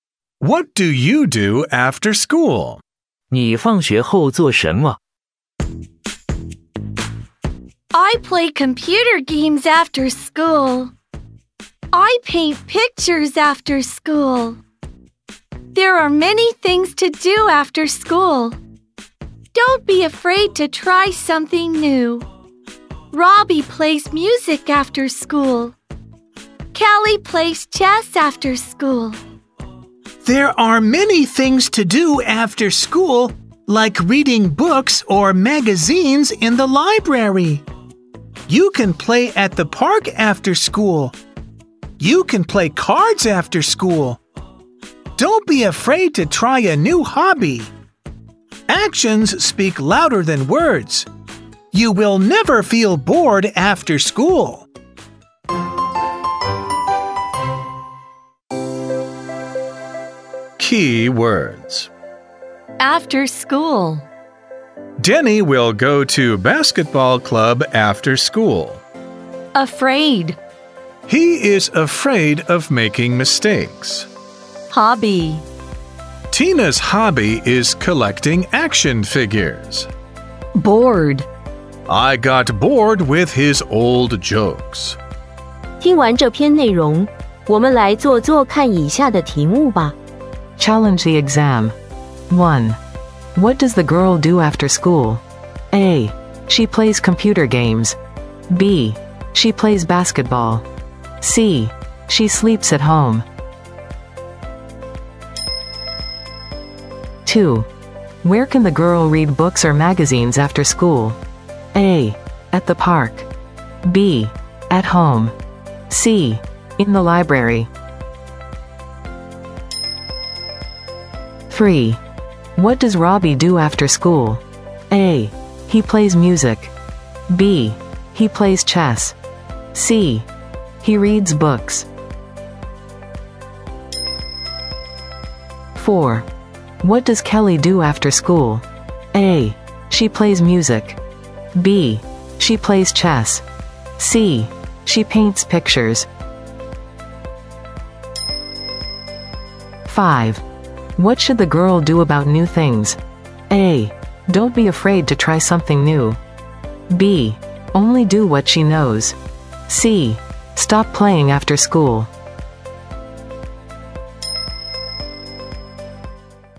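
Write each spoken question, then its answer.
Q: Where can the girl read books or magazines after school?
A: C: In the library.

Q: What does Robbie do after school?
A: A: He plays music.

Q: What does Kelly do after school?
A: B: She plays chess.

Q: What should the girl do about new things?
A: A: Don't be afraid to try something new.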